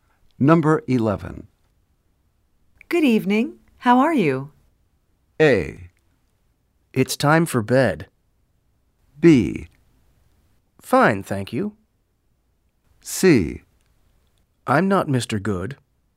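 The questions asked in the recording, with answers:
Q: Good evening. How are you?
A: B: Fine, thank you.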